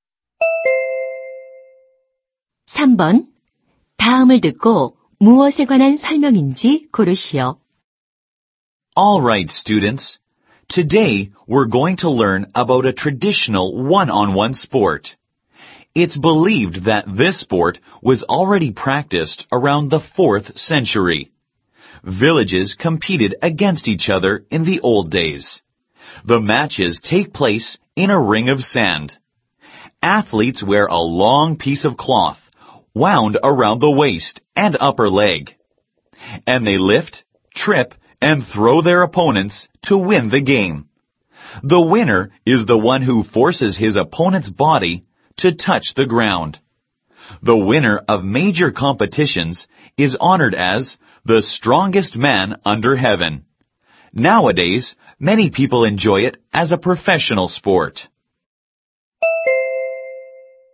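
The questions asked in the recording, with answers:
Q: 다음을 듣고 무엇에 관한 설명인지 고르시오.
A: 씨름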